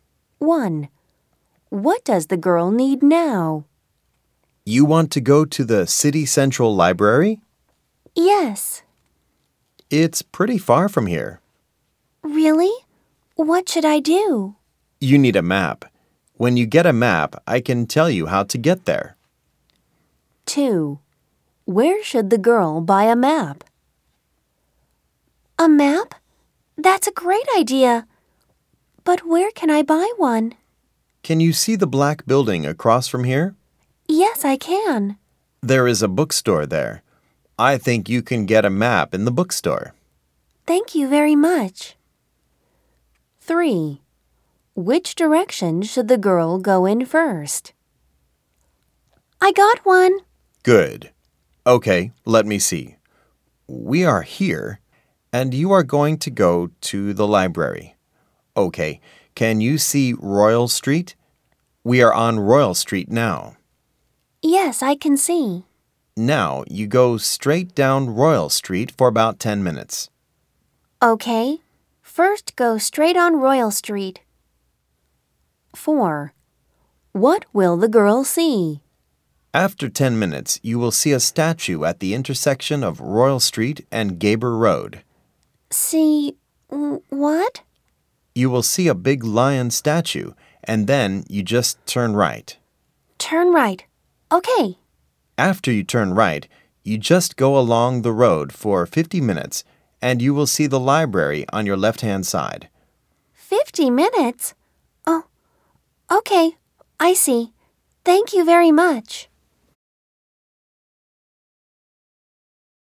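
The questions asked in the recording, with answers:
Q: What does the girl need now?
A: A map

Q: Where should the girl buy a map?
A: In the bookstore in the black building

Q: Which direction should the girl go in first?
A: Straight down Royal Street

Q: What will the girl see?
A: A big lion statue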